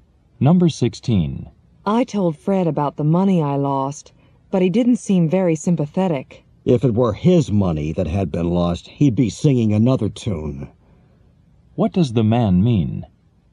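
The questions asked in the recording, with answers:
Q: What does the man mean?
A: Fred would feel differently if it were his money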